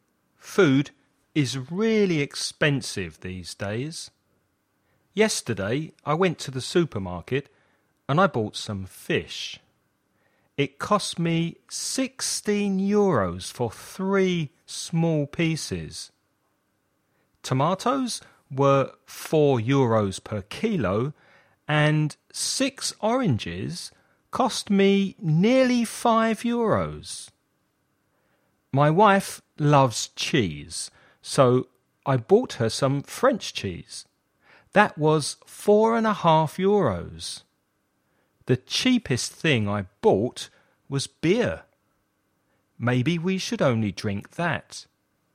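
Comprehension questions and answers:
Escucha el audio y completa el ejercicio.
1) Where did the man do his shopping?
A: At the supermarket

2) What did he buy that cost 16 euros?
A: Fish (3 small pieces)

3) What cost nearly 5 euros?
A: 6 oranges

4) What did the man buy for his wife?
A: French cheese

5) What was the cheapest thing he bought?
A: Beer

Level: nivel básico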